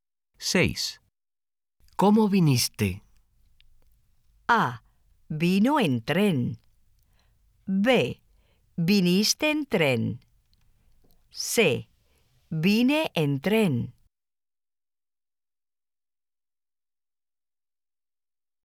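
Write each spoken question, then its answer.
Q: ¿Cómo viniste?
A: C: Vine en tren.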